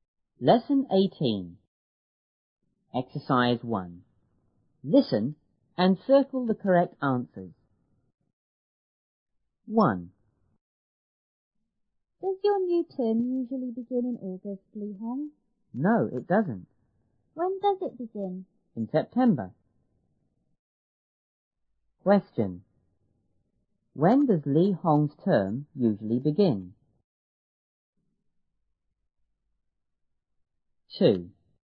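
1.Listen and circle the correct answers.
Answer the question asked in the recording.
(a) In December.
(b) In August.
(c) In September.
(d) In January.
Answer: (c) In September.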